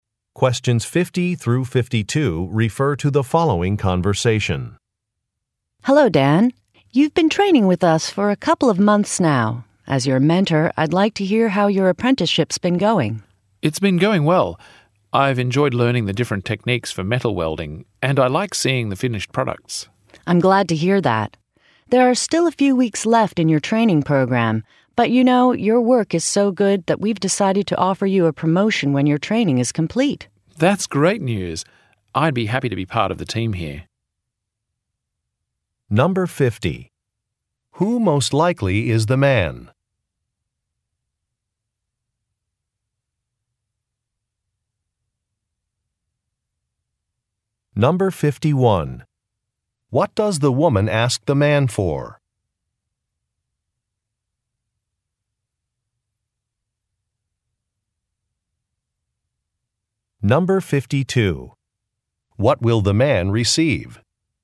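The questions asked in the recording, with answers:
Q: Who most likely is the man?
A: An apprentice (trainee) in metal welding

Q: What does the woman ask the man for?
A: Feedback on how his apprenticeship has been going

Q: What will the man receive?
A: A promotion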